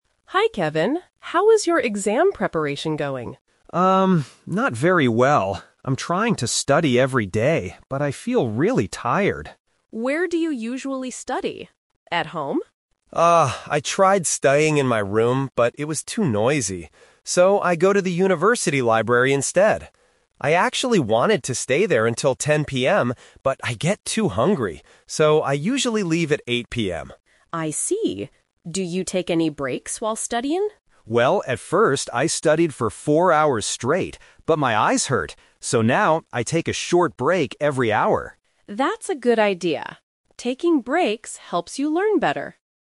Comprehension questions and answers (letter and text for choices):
Listen to the conversation and choose the correct answer (A, B, or C).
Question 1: Where does Kevin usually study for his exams?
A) In his room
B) At the university library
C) In a coffee shop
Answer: B) At the university library

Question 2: What time does Kevin usually leave the library?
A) 8:00 PM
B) 10:00 PM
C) 4:00 PM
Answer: A) 8:00 PM

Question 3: What is Kevin's new study habit?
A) He studies for four hours without stopping.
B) He sleeps for an hour at the library.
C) He takes a short break every hour.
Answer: C) He takes a short break every hour.

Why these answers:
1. Kevin says "I go to the university library instead." Option A (In his room) is a trap because he tried studying there, but it was too noisy. Option C is not mentioned in the audio.
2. Kevin clearly states, "So, I usually leave at 8:00 PM." Option B (10:00 PM) is a trap because that was the time he wanted to stay until, but he changed his mind because he gets too hungry. Option C is not mentioned.
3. Kevin says "So now, I take a short break every hour." Option A (studies for four hours without stopping) is a trap because this was his old habit ("at first, I studied for four hours straight"). Option B is not mentioned.

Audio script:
Ms. Green: Hi, Kevin. How is your exam preparation going?
Kevin: Um, not very well. I'm trying to study every day, but I feel really tired.
Ms. Green: Where do you usually study? At home?
Kevin: Ah, I tried studying in my room, but it was too noisy. So, I go to the university library instead. I actually wanted to stay there until 10:00 PM, but I get too hungry.
Ms. Green: I see. Do you take any breaks while studying?
Kevin: Well, at first, I studied for four hours straight. But my eyes hurt. So now, I take a short break every hour.
Ms. Green: That's a good idea. Taking breaks helps you learn better.